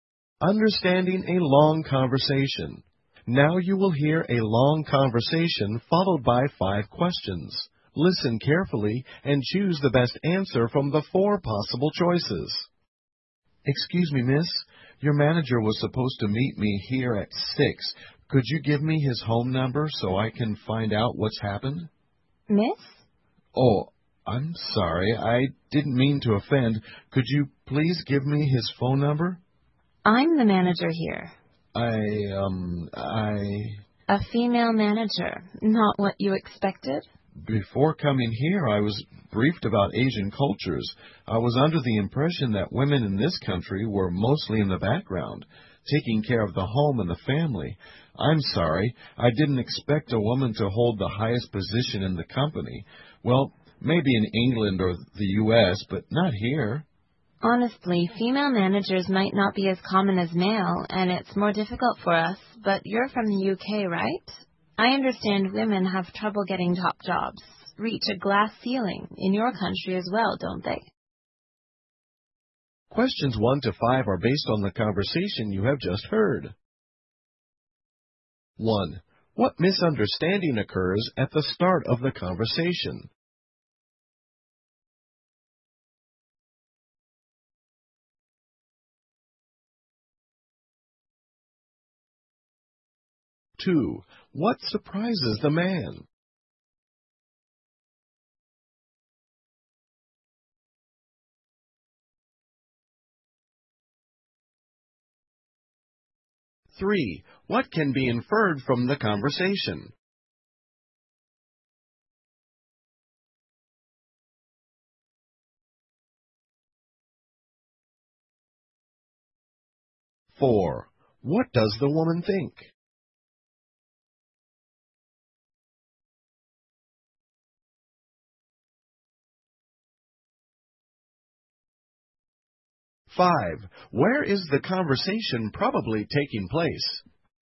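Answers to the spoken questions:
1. The man thinks the woman is not the manager.
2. The manager is a woman.
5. In an Asian country.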